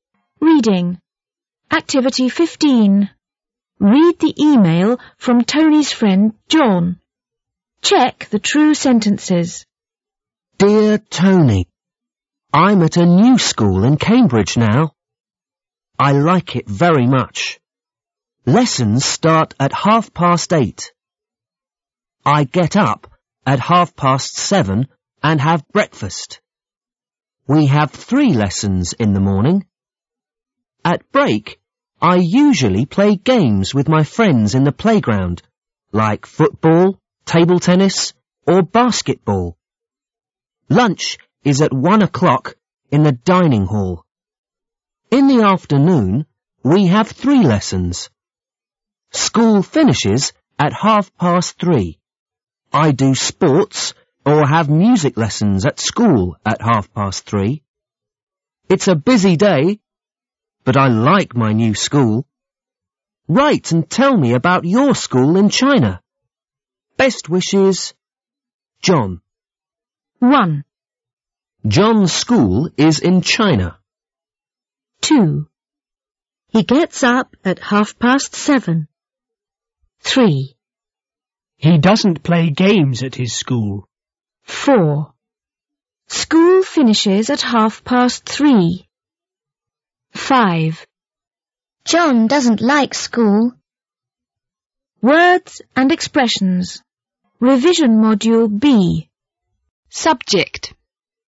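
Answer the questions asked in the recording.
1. False
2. True
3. False
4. True
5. False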